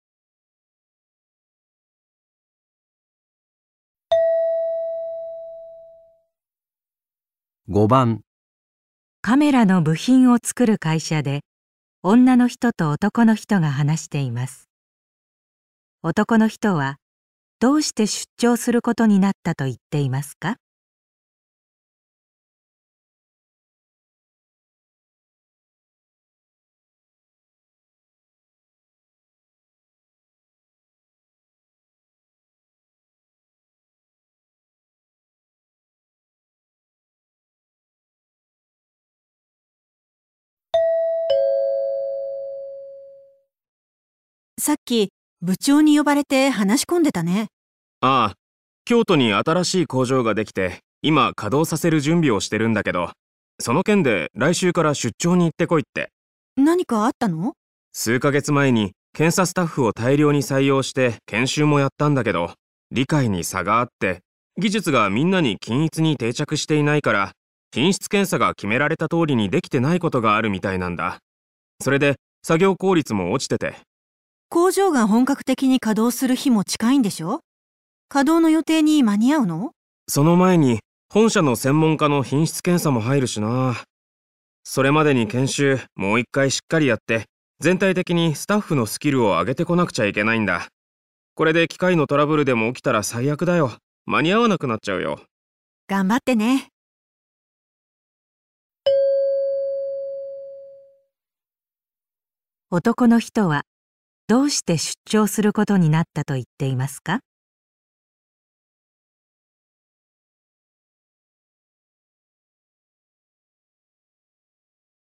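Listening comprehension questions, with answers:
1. 男の人はどうして出張することになったと言って いますか?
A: 製品の検査スタッフを指導するため

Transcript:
女の人:さっき部長に呼ばれて話し込んでたね。
男の人 : ああ、京都に新しい工場ができて今稼働させる準備をしてるんだけど、その件で来週から出張に行っ てこいって。
女の人:何かあったの?
男の人 : 数か月前に検査スタッフを大量に採用して、研修もやったんだけど理解に差があって、技術がみんな に均一に定着していないから、品質検査が決められた通りに出来てないことがあるみたいなんだ。それで作 業効率も落ちてて。
女の人:工場が本格的に稼働する日も近いんでしょ?稼働の予定に間に合うの?
男の人:その前に本社の専門家の品質検査も入るしなぁ。 それまでに研修、もう一回しっかりやって全体的に スタッフのスキルを上げてこなくちゃいけないんだ。これで機械のトラブルでも起きたら最悪だよ。 間に合わなく なっちゃうよ。
女の人:頑張ってね。
質問:男の人はどうして出張することになったと言っていますか?

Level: N1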